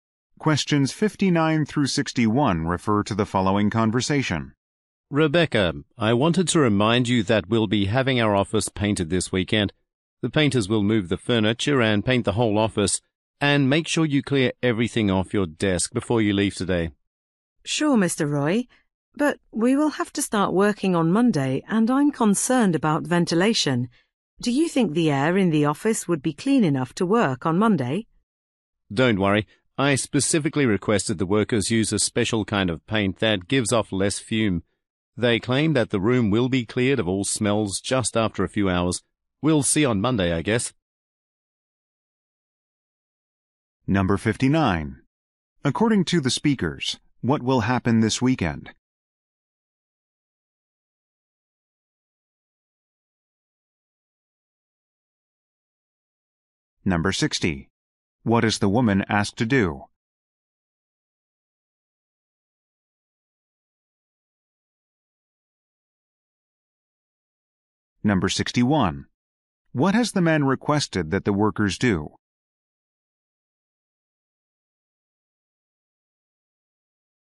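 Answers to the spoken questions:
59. The office will be painted
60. Clear everything off her desk
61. Use a special paint that gives off less fumes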